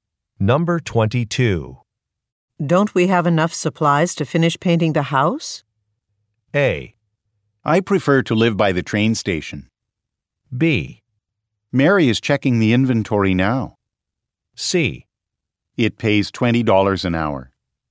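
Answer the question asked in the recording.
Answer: B: Mary is checking the inventory now.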